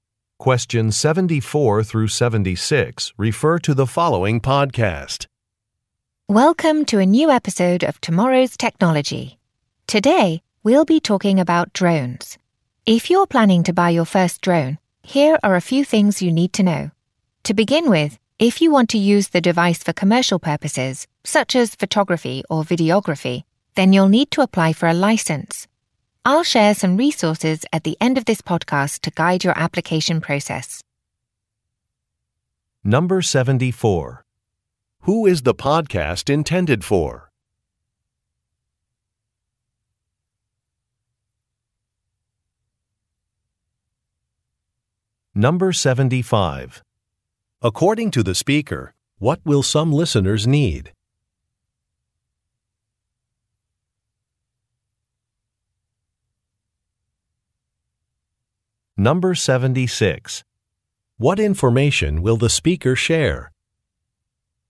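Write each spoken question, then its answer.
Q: Who is the podcast intended for?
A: People buying their first drone

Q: According to the speaker, what will some listeners need?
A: A license for commercial use

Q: What information will the speaker share?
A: Resources to guide the license application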